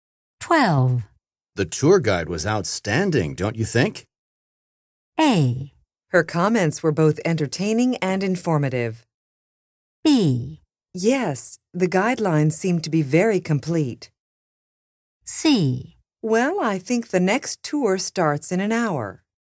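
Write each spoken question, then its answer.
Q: The tour guide was outstanding, don't you think?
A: A: Her comments were both entertaining and informative.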